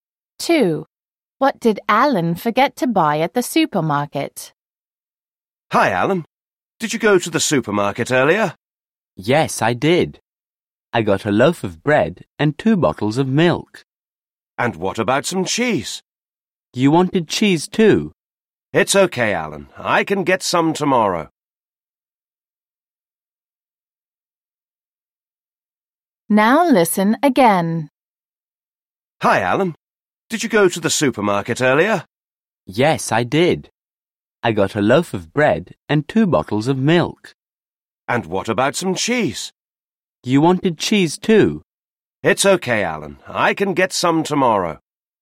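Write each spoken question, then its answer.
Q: What did Alan forget to buy at the supermarket?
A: Cheese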